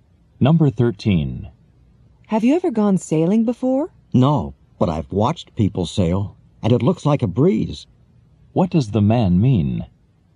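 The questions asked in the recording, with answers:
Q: What does the man mean?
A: Sailing looks easy.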